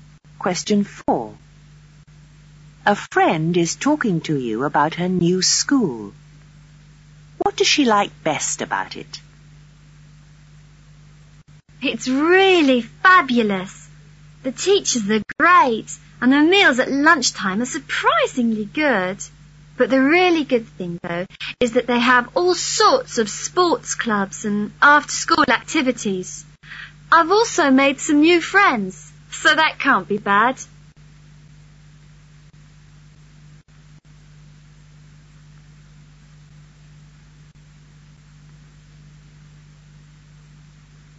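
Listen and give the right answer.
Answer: The sports clubs and after-school activities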